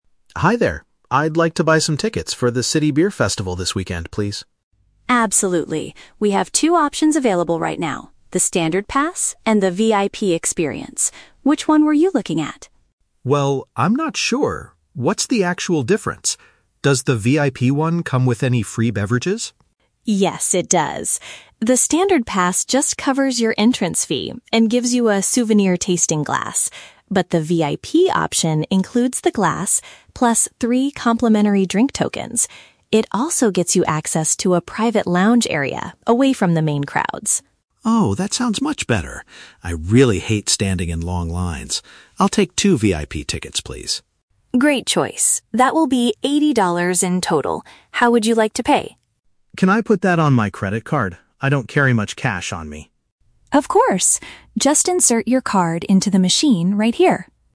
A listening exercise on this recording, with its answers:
Listen to a conversation between a customer and a ticket clerk, and choose the correct answer (A, B, or C) for each question.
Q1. What is included in the basic admission ticket?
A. Three free drinks and entry to the festival.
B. The cost of getting inside and a special cup to keep.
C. A discount on food and unlimited beverages.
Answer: B. The cost of getting inside and a special cup to keep.

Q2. Why does the man choose the more expensive ticket?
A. He wants to avoid waiting with a large number of people.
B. He wants to collect a unique souvenir drinking glass.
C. He is organizing a private party for his friends.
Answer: A. He wants to avoid waiting with a large number of people.

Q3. How does the man complete his purchase?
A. By handing over eighty dollars in paper money.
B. By reserving the tickets online in advance.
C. By using an electronic payment method.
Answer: C. By using an electronic payment method.

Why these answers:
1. The clerk says the "Standard pass" (basic admission ticket) covers the "entrance fee" (cost of getting inside) and gives a "souvenir tasting glass" (special cup to keep). Option (B) accurately paraphrases this. Option (A) is a trap; the three free drinks are only included in the VIP option. Option (C) is a plausible guess but is never mentioned in the audio.
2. The clerk mentions the VIP ticket has a "private lounge area away from the main crowds", and the man replies that he hates "standing in long lines." Option (A) uses synonyms to express this idea. Option (B) is a trap; the "souvenir tasting glass" is mentioned, but he could get that with the Standard ticket too, so it's not the reason he upgrades. Option (C) is a trap; he buys "two" tickets, not for a whole party.
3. The man asks, "Can I put that on my credit card?" and the clerk tells him to "insert your card into the machine." Option (C) perfectly paraphrases using a credit card. Option (A) is a trap; "eighty dollars" and "cash" are mentioned, but the man explicitly says he doesn't carry much cash. Option (B) is incorrect because he is buying them in person.

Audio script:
Customer: Hi there. I'd like to buy some tickets for the City Beer Festival this weekend, please.
Clerk: Absolutely. We have two options available right now: the Standard pass and the VIP experience. Which one were you looking at?
Customer: Well, I'm not sure. What's the actual difference? Does the VIP one come with any free beverages?
Clerk: Yes, it does. The Standard pass just covers your entrance fee and gives you a souvenir tasting glass. But the VIP option includes the glass, plus three complimentary drink tokens. It also gets you access to a private lounge area away from the main crowds.
Customer: Oh, that sounds much better. I really hate standing in long lines. I'll take two VIP tickets, please.
Clerk: Great choice. That will be eighty dollars in total. How would you like to pay?
Customer: Can I put that on my credit card? I don't carry much cash on me.

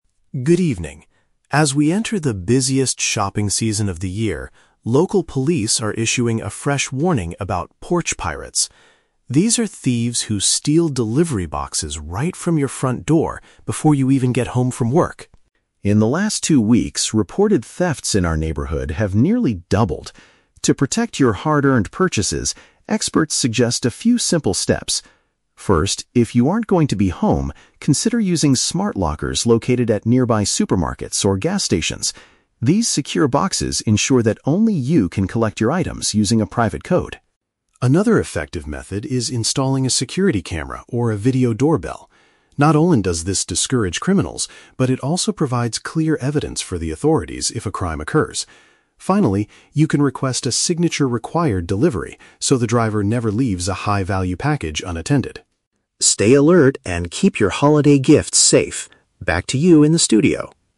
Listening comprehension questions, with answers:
Listen to a local news report about package theft and choose the best answer (A, B, or C) for each question.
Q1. What is the main problem currently facing the local neighborhood?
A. Delivery drivers are leaving packages at the wrong addresses.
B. There is a significant increase in criminals stealing parcels from doorsteps.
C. Online stores are failing to deliver holiday gifts on time.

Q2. How do "smart lockers" help prevent theft according to the report?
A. They allow neighbors to watch over your house while you are at work.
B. They provide a locked location that requires a special password to open.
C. They are hidden inside the customer's house so thieves cannot see them.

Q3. What is mentioned as a benefit of installing a security camera?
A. It automatically calls the police the moment a package is delivered.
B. It helps the delivery driver find the correct house more easily.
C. It can provide proof to the police if a theft actually happens.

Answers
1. B. There is a significant increase in criminals stealing parcels from doorsteps.
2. B. They provide a locked location that requires a special password to open.
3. C. It can provide proof to the police if a theft actually happens.

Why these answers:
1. The anchor mentions "thieves who steal delivery boxes right from your front door" and says thefts have "nearly doubled." Option B paraphrases "thieves" as "criminals" and "front door" as "doorsteps." Why the trap is wrong: Option (A) and (C) are common shopping issues but are not the focus of this security warning.
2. The report states lockers are "secure boxes" where you "collect your items using a private code." Option B uses synonyms: "locked location" and "special password." Why the trap is wrong: Option (A) is a different safety tip (neighbor watch) not mentioned here. Option (C) is a trap; the lockers are at "supermarkets or gas stations," not inside the house.
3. The anchor says a camera "provides clear evidence for the authorities if a crime occurs." Option C paraphrases "evidence" as "proof" and "authorities" as "police." Why the trap is wrong: Option (A) is an exaggeration; cameras record but usually don't call the police automatically. Option (B) is not a security function mentioned in the text.

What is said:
News Anchor: Good evening. As we enter the busiest shopping season of the year, local police are issuing a fresh warning about "porch pirates." These are thieves who steal delivery boxes right from your front door before you even get home from work.
In the last two weeks, reported thefts in our neighborhood have nearly doubled. To protect your hard-earned purchases, experts suggest a few simple steps. First, if you aren't going to be home, consider using smart lockers located at nearby supermarkets or gas stations. These secure boxes ensure that only you can collect your items using a private code.
Another effective method is installing a security camera or a video doorbell. Not only does this discourage criminals, but it also provides clear evidence for the authorities if a crime occurs. Finally, you can request a "signature required" delivery so the driver never leaves a high-value package unattended.

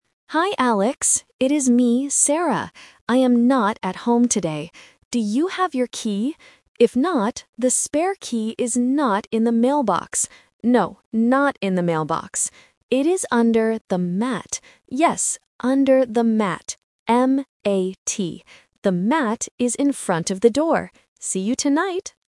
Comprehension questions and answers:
Listen to the voice message and choose the correct answer (A, B, or C).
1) What does Sarah want Alex to find?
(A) A phone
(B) A key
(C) A box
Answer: (B) A key

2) Where is the item hiding?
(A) Under the mat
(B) In the mailbox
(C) In the bedroom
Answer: (A) Under the mat

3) How do you spell the object where the key is hiding?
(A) M-A-P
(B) M-A-C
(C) M-A-T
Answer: (C) M-A-T

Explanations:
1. Sarah asks, "Do you have your key? If not, the spare key is..." Option (A) is plausible because it is a voice message, but she doesn't want him to find a phone. Option (C) is a trap related to the word "mailbox".
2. Sarah explicitly states, "It is under the mat." Option (B) "In the mailbox" is the trap because Sarah mentions it but uses negation: "the spare key is not in the mailbox." Option (C) is not mentioned in the audio.
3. Sarah spells the word out loudly and clearly: "M-A-T". Option (A) and Option (B) are spelling traps with similar-sounding letters at the end of the word to confuse beginners.

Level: A1

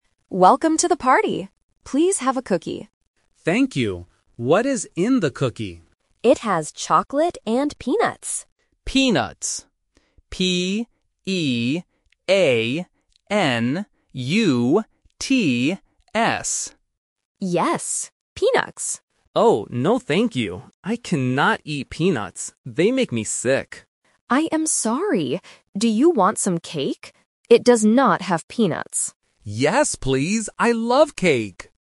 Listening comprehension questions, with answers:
Listen to the conversation between a host and a guest at a party, and choose the correct answer (A, B, or C) for each question.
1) What food makes the guest sick?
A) Chocolate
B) Peanuts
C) Cake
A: B) Peanuts

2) How does the guest spell the food he cannot eat?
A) P-E-A-N-U-T-S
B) P-E-E-N-U-T-S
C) P-E-N-U-T-S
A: A) P-E-A-N-U-T-S

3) What will the guest eat?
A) A cookie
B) Some fruit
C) Some cake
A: C) Some cake

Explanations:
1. The guest clearly states, "I cannot eat peanuts. They make me sick." Option (A) Chocolate is The Trap: chocolate is mentioned as an ingredient in the cookie, but it is not what makes the guest sick. Option (C) Cake is what the guest actually wants to eat.
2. To be sure about the ingredient, the guest spells the word clearly: "P-E-A-N-U-T-S". Options (B) and (C) are common spelling mistakes for this word.
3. At the end of the conversation, the host asks, "Do you want some cake?" and the guest replies, "Yes, please. I love cake!" Option (A) A cookie is The Trap: the host offers a cookie first, but the guest rejects it because it has peanuts. Option (B) Some fruit is not mentioned in the audio.

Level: A1

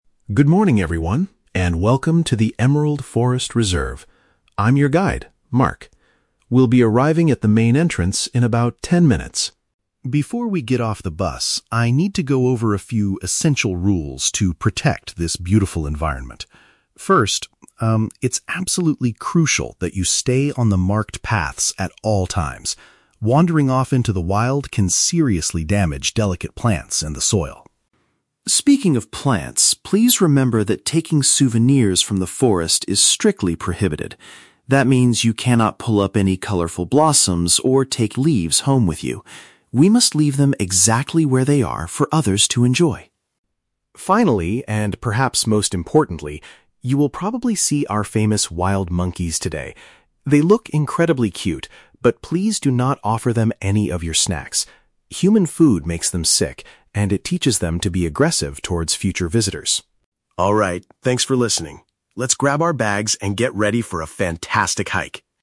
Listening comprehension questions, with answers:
Listen to a tour guide talking to a group of tourists on a bus. Choose the correct answer (A, B, or C) for each question.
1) Where should the tourists walk during the tour?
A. Deep into the wild to explore the soil.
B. Only on the designated routes.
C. Next to the main entrance of the reserve.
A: B. Only on the designated routes.

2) What is the rule regarding the forest's flowers and leaves?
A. Guests are not allowed to collect them to keep.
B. Guests can buy them as souvenirs at the entrance.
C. Guests are encouraged to take a few of them home.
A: A. Guests are not allowed to collect them to keep.

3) Why is giving food to the monkeys forbidden?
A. Because they already have plenty of their own snacks.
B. Because it might cause them to steal the visitors' bags.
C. Because it negatively affects their health and behavior.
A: C. Because it negatively affects their health and behavior.

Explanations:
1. The guide says it is crucial to "stay on the marked paths". "Marked paths" is paraphrased as "designated routes".
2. The guide states that "taking souvenirs from the forest is strictly prohibited" and they "cannot pull up any colourful blossoms". This means they are not allowed to collect them.
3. The guide explains that human food "makes them sick" (affects health) and "teaches them to be aggressive" (affects behavior).

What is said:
Mark: Good morning, everyone, and welcome to the Emerald Forest Reserve. I'm your guide, Mark. We'll be arriving at the main entrance in about ten minutes.
Before we get off the bus, I need to go over a few essential rules to protect this beautiful environment. First, um, it's absolutely crucial that you stay on the marked paths at all times. Wandering off into the wild can seriously damage delicate plants and the soil.
Speaking of plants, please remember that taking souvenirs from the forest is strictly prohibited. That means you cannot pull up any colourful blossoms or take leaves home with you. We must leave them exactly where they are for others to enjoy.
Finally, and perhaps most importantly, you will probably see our famous wild monkeys today. They look incredibly cute, but please do not offer them any of your snacks. Human food makes them sick, and it teaches them to be aggressive towards future visitors.
Alright, thanks for listening. Let's grab our bags and get ready for a fantastic hike!

